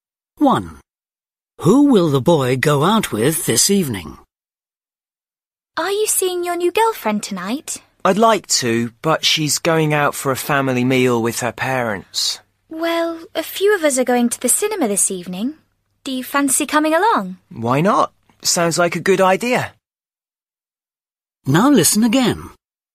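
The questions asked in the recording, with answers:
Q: Who will the boy go out with this evening?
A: a few friends (to the cinema)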